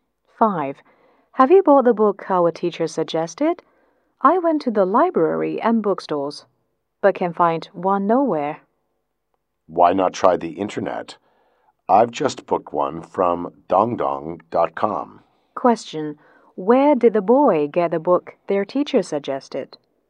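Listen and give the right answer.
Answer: On the internet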